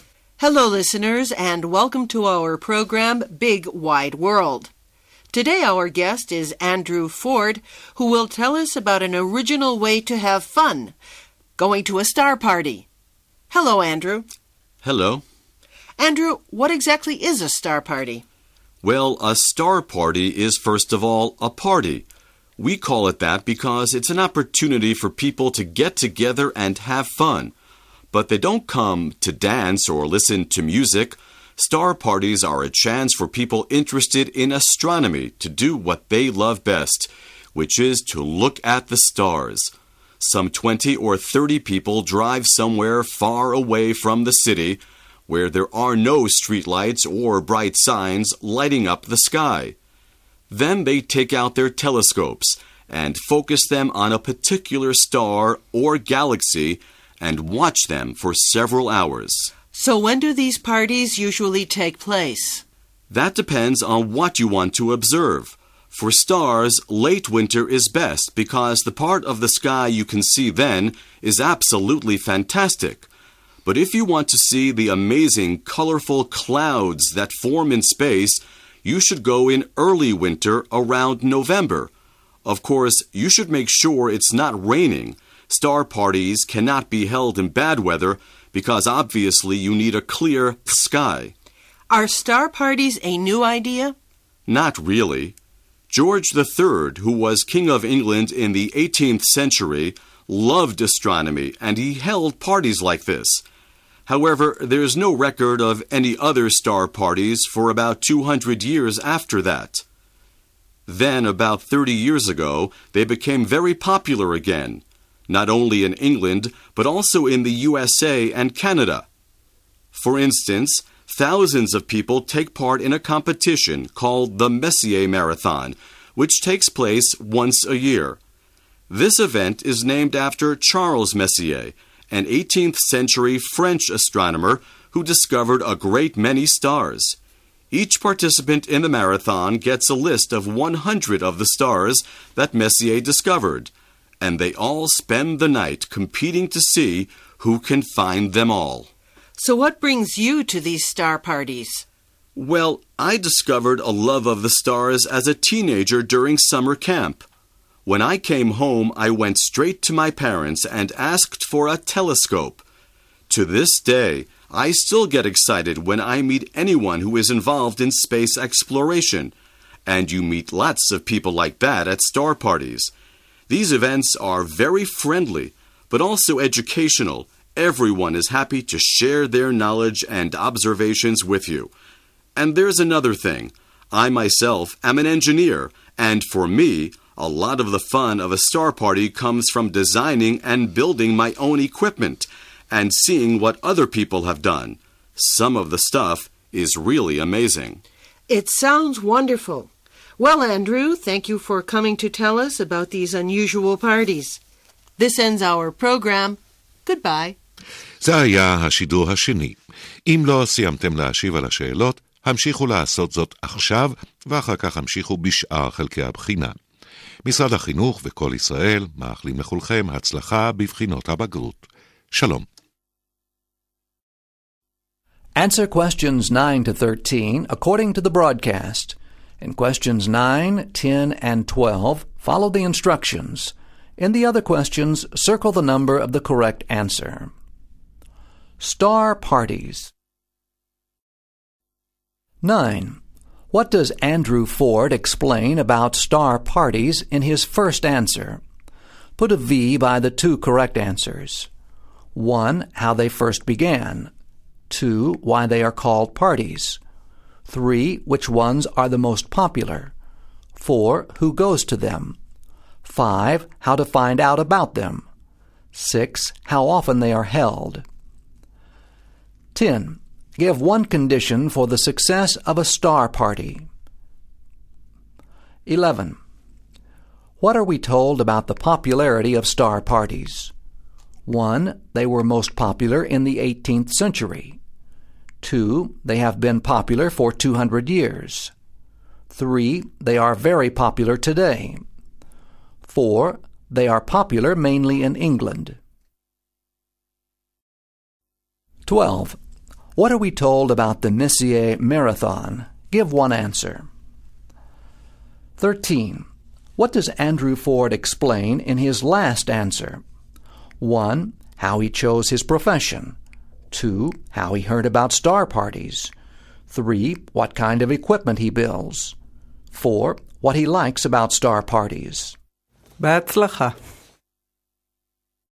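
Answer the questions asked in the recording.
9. 2: Why they are called parties; 4: Who goes to them
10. A clear sky with no rain / far from city lights
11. 3: They are very popular today.
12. It takes place once a year; participants compete all night to find 100 stars Messier discovered
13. 4: What he likes about star parties.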